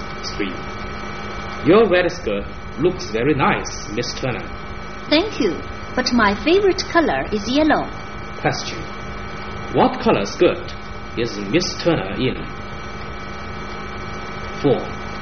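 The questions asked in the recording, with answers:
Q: what color skirt is Miss Turner in?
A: Red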